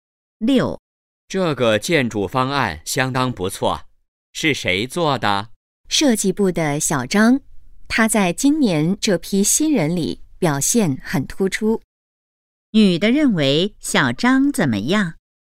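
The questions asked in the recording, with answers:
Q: 女的认为小张怎么样?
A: 表现很突出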